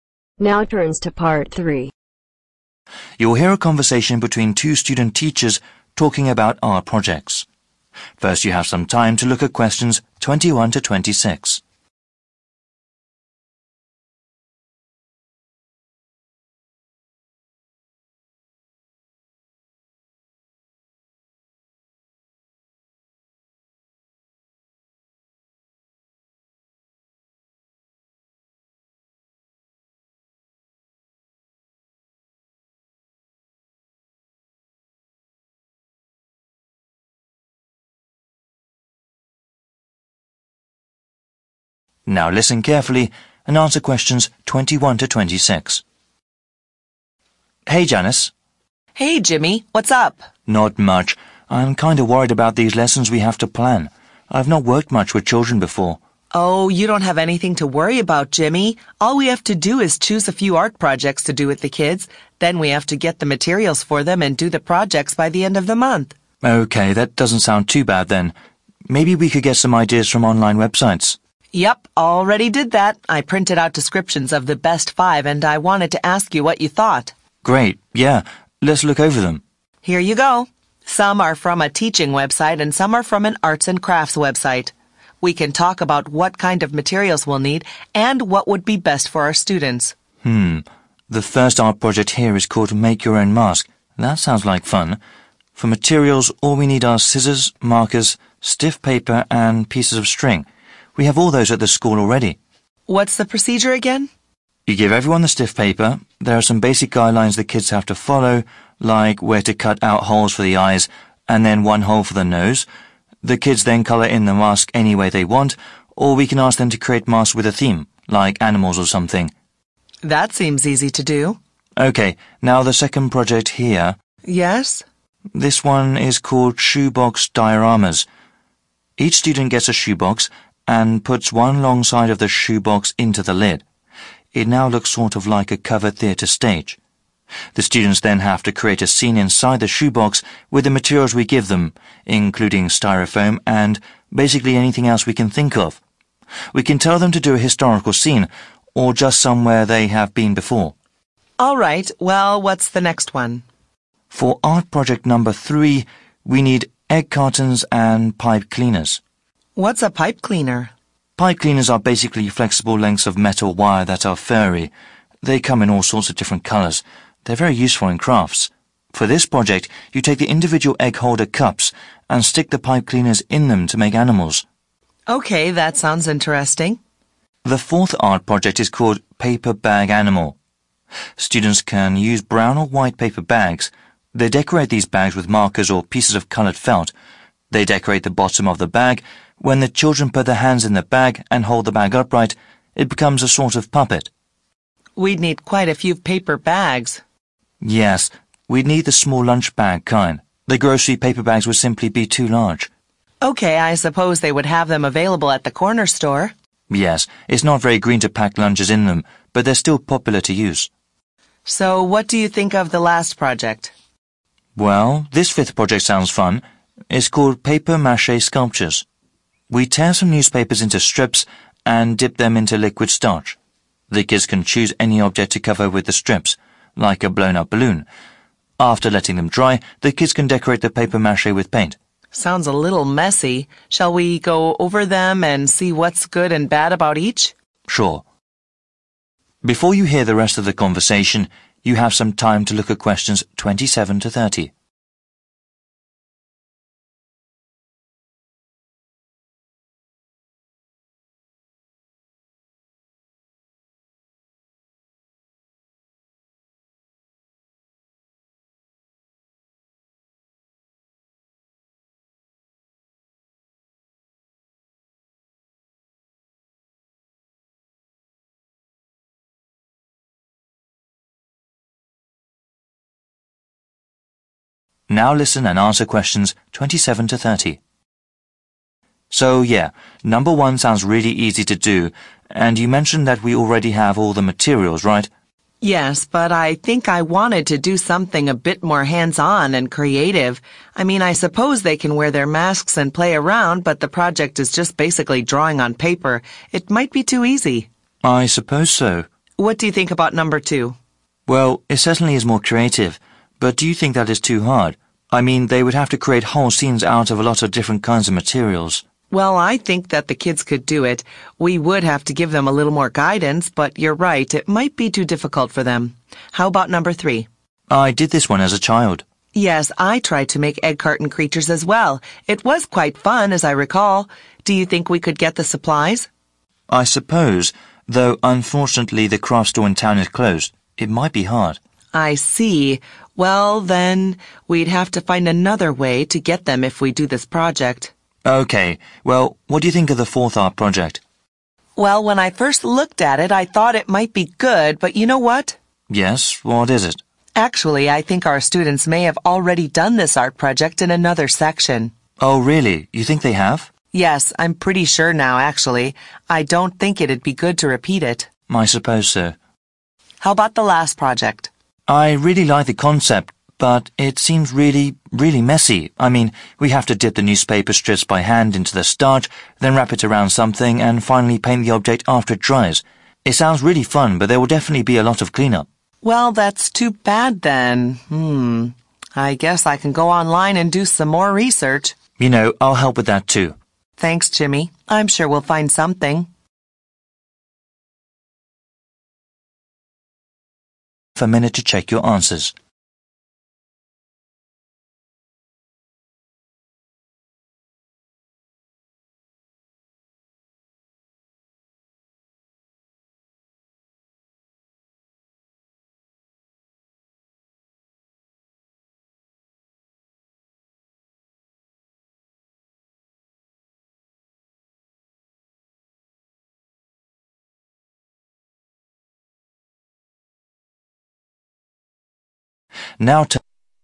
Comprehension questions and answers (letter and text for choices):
Write NO MORE THAN TWO WORDS for each answer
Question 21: papers and pieces of 21.................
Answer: string

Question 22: Then 22................ in the mask.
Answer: color

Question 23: Students can make a 23............ scene or somewhere they have been before.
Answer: historical

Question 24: cleaners, which are flexible lengths of 24............ that are furry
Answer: metal wire

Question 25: 25............... of the paper bag.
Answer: bottom

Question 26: Can cover any 26................ with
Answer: object

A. might take too much time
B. seems really messy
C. may have already done it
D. might be too easy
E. might be hard to get materials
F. seems dangerous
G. might be too difficult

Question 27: Project 1: 27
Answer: D. might be too easy

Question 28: Project 2: 28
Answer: G. might be too difficult

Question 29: Project 4: 29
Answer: C. may have already done it

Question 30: Project 5: 30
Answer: B. seems really messy